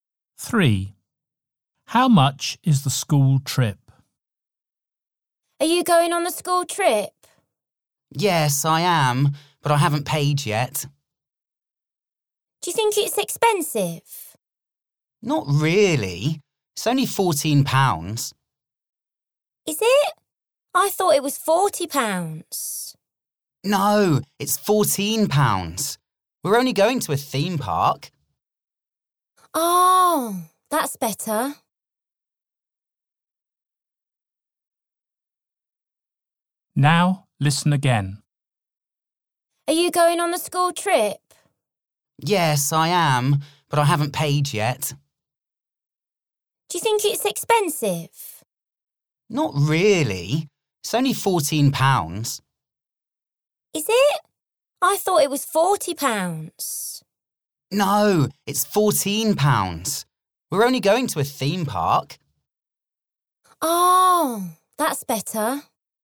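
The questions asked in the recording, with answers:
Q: How much is the school trip?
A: £14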